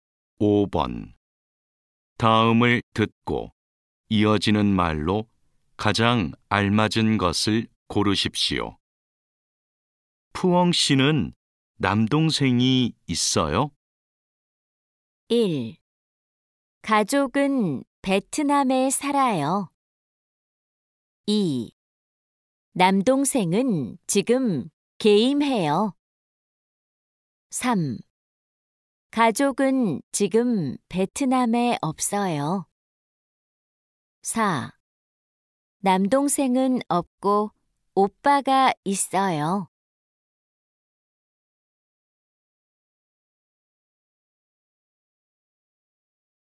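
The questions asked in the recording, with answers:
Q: 푸엉 씨는 남동생이 있어요?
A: 4: 남동생은 없고 오빠가 있어요.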